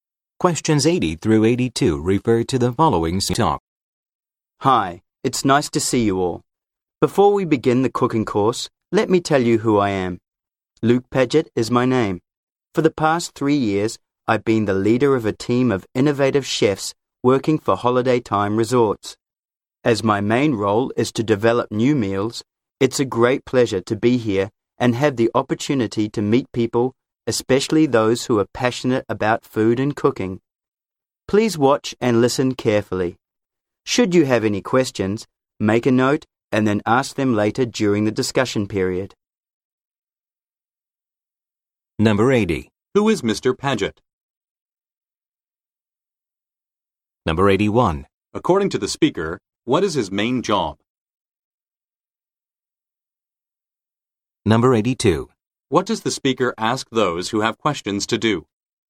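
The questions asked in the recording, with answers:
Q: Who is Mr. Paget?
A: Leader of a team of chefs at Holiday Time Resorts

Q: According to the speaker, what is his main job?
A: Developing new meals

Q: What does the speaker ask those who have questions to do?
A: Make a note and ask later during the discussion period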